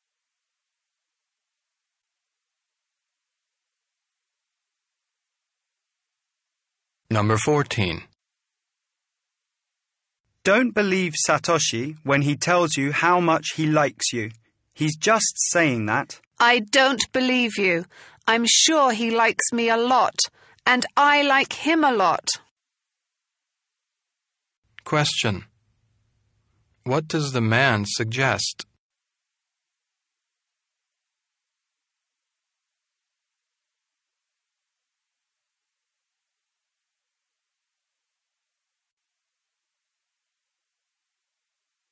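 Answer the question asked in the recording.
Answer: Satoshi doesn't really like her; he's just saying it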